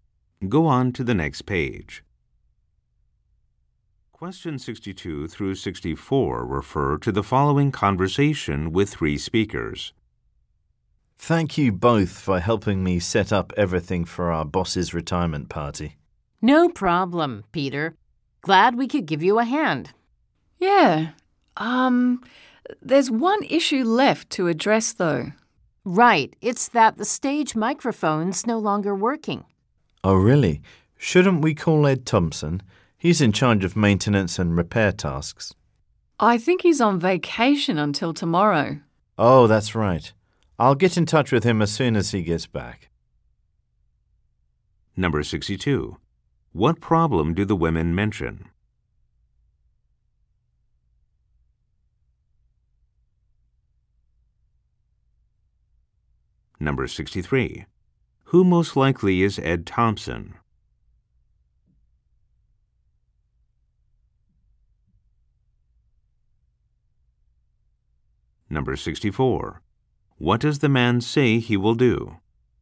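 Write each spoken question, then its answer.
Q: What problem do the women mention?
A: The stage microphone isn't working

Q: Who most likely is Ed Thompson?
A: The person in charge of maintenance and repairs

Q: What does the man say he will do?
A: Contact Ed Thompson when he gets back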